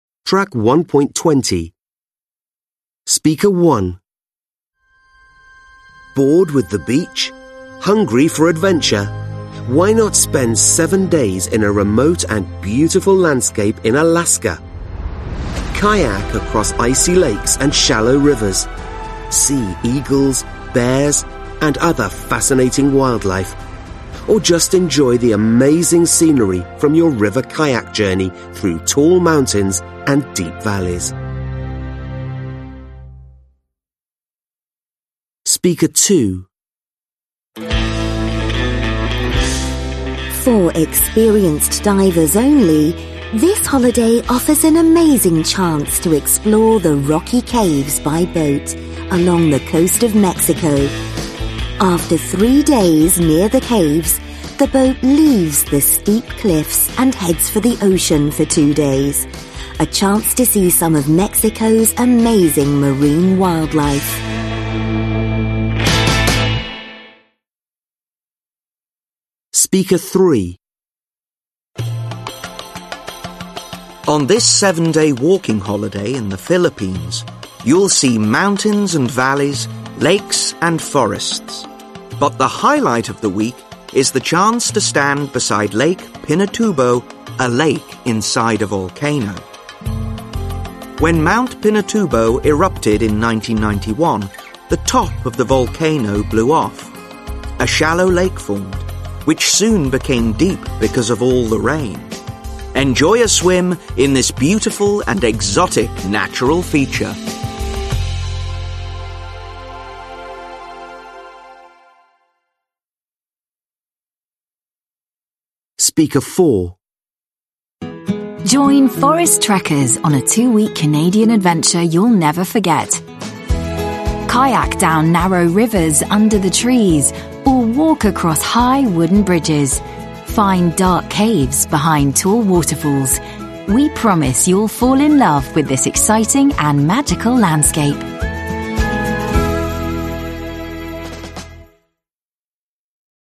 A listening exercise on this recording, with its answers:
Listen again. Complete the extracts (1-6) from the adverts using the prepositions below, nouns from exercise 2 and adjectives from exercise 3.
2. Journey _______ _______ mountains and deep _______.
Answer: through / tall / valleys

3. Explore the _______ caves _______ the coast of Mexico.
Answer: rocky / along

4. Stand _______ Lake Pinatubo, a lake _______ a _______.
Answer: beside / inside / volcano

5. A _______ lake formed, which soon became _______.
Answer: shallow / deep

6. Find dark _______ _______ tall _______.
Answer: caves / behind / waterfalls

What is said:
1. Bored with the beach? Hungry for adventure? Why not spend seven days in a remote and a beautiful landscape in Alaska? Kayak across icy lakes and shallow rivers, see eagles, bears and other fascinating wildlife. Or just enjoy the amazing scenery from your river kayak journey through tall mountains and deep valleys.
2. For experiences divers only! This holiday offers an amazing chance to explore the rocky caves by boat along the coast of Mexico. After three days near the caves, the boat leaves the steep cliffs and heads for the ocean for two days. A chance to see some of Mexico's amazing marine wildlife.
3. On this seven-day walking holiday in the Philipines, you'll see mountains and valleys, lakes and forests. But the highlight of the week is the chance to stand beside Lake Pinatubo, a lake inside the volcano When Mount Pinatubo in erupted in 1991, the top of the volcano blew off, a shallow lake formed, which soon became deep because of all the rain. Enjoy a swim in this beautiful and exotic natural feature!
4. Join Forest trekkers on a 2 weeks Canadian adventure you'll never forget Kayak down narrow rivers under the trees or walk across high wooden bridges, find dark caves behind tall waterfalls. We promise you'll fall in love with this exciting and magical landscapes.

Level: Lớp 10